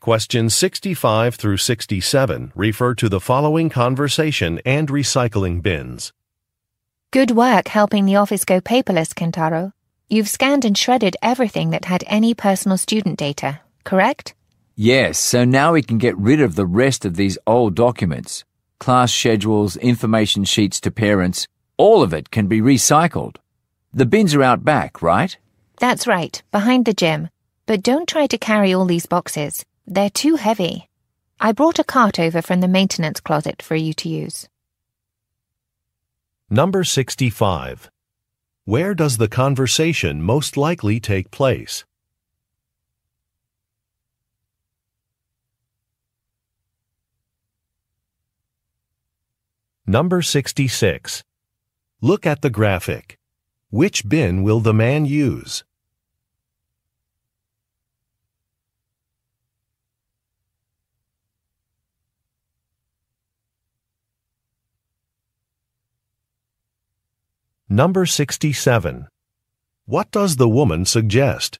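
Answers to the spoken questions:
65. At a school
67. Using a cart to move the boxes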